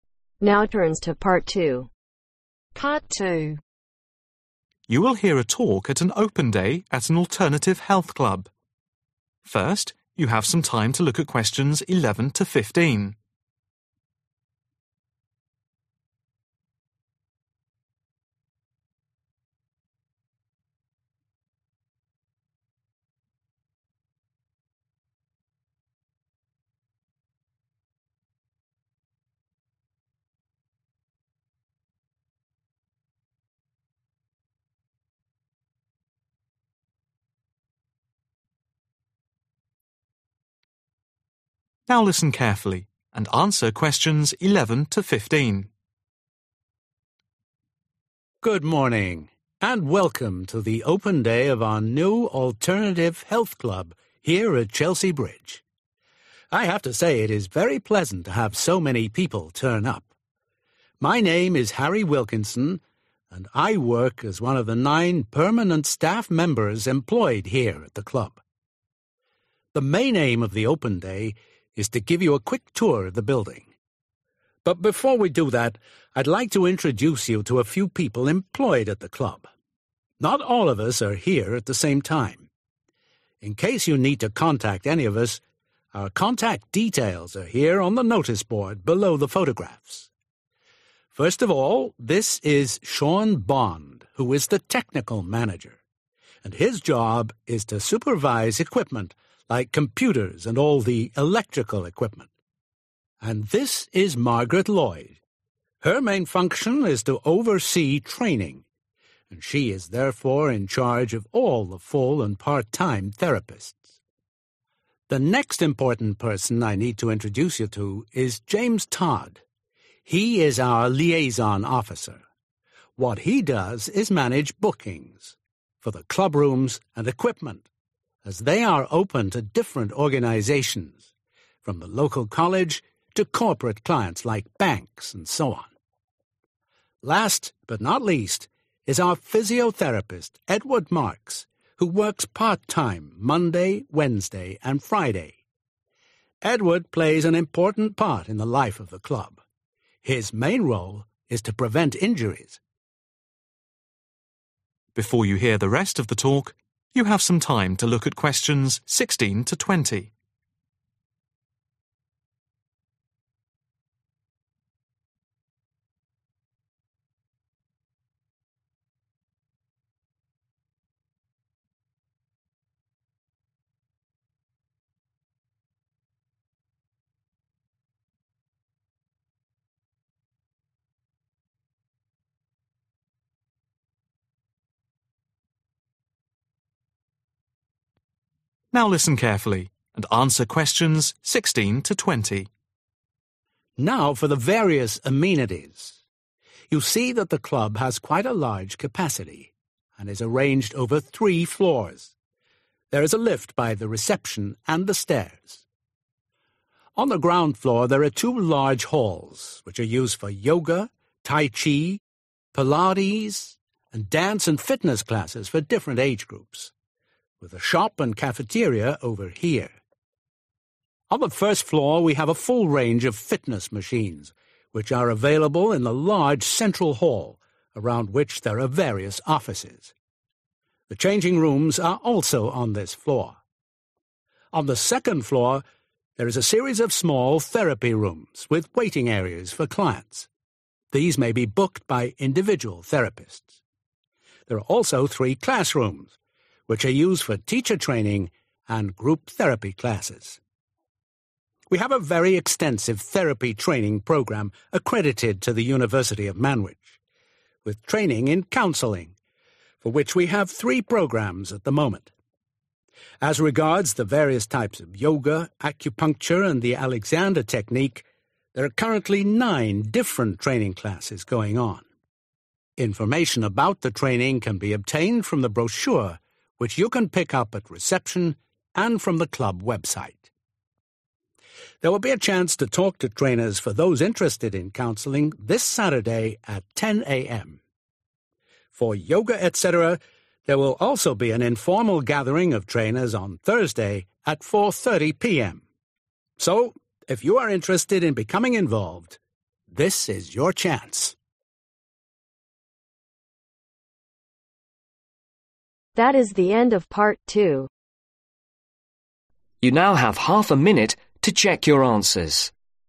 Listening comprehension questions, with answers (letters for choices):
Complete the sentences below. Write NO MORE THAN TWO WORDS for each answer.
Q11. In the Club, there are nine ............ staff members.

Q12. The main purpose of the Open Day is to give a quick ............ of the premises.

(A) storerooms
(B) therapy rooms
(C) offices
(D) study area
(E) cafeteria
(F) lecture theatre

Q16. Ground floor ............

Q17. First floor ............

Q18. Second floor ............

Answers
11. Permanent
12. Tour
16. E
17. C
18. B